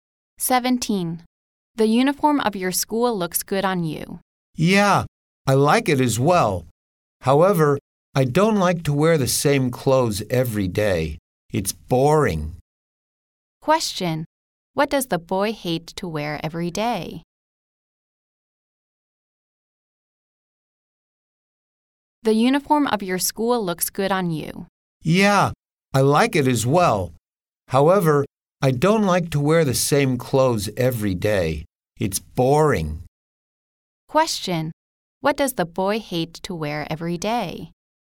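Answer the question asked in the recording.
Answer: The same clothes (his school uniform)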